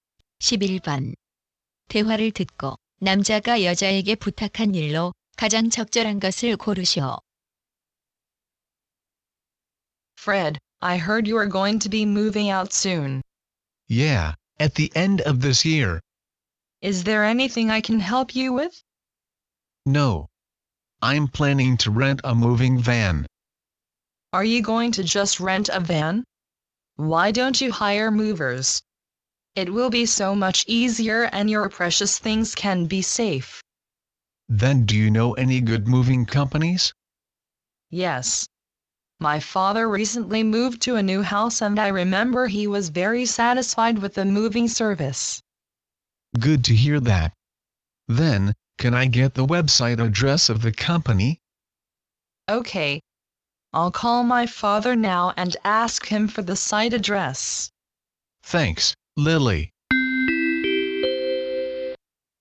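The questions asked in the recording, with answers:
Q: 대화를 듣고 남자가 여자에게 부탁한 일로 가장 적절한 것을 고르시오.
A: 이삿짐 업체의 웹사이트 주소 알려주기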